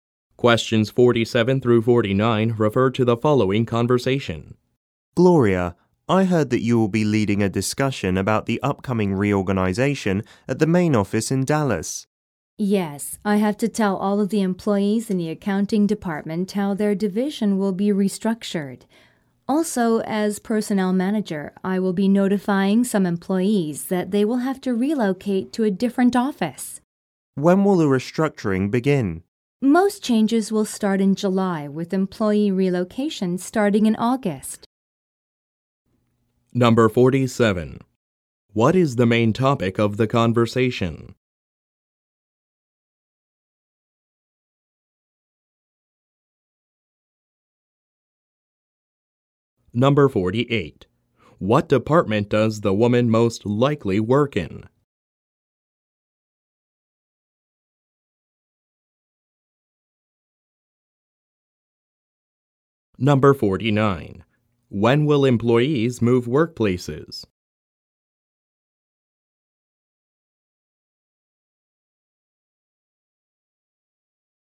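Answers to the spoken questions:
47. The upcoming reorganization (restructuring) at the main office
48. Personnel
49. In August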